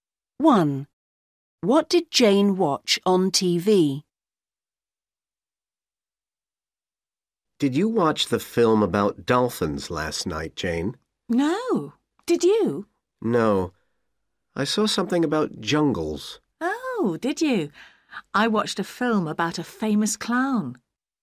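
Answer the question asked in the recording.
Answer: A film about a famous clown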